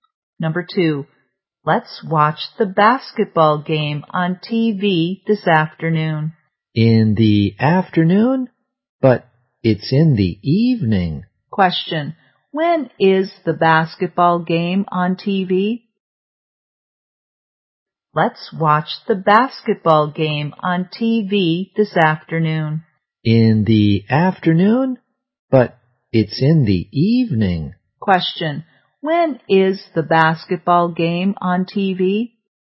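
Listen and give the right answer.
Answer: In the evening.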